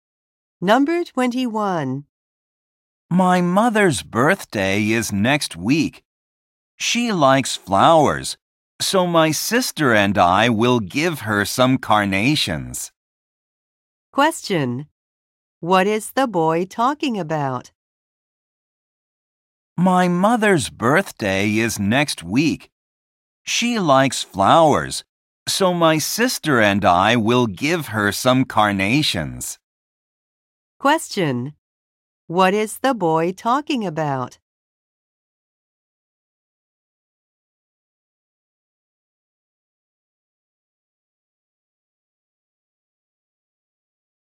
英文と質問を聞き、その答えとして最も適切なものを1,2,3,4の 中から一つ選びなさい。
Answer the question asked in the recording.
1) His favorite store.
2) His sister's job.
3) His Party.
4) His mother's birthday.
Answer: 4) His mother's birthday.

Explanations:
話題は、1文目のMy mother's birthday is next week. 僕の母の誕生日は来週です。 とあるので答えはすぐにわかります。

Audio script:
My mother's birthday is next week, She likes flowers, So
my sister and I will give her some carnations.
Question: What is the boy talking about?

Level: 英検4級